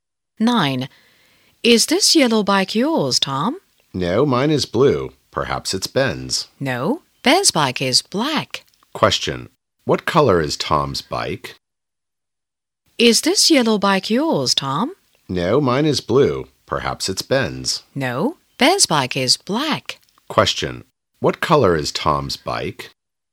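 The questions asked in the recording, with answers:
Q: What color is Tom's bike?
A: Blue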